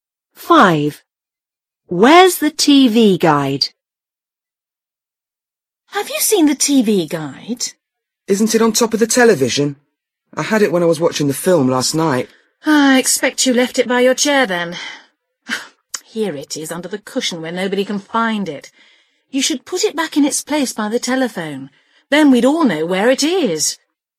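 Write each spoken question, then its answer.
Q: Where's the TV guide?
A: Under the cushion (on the chair)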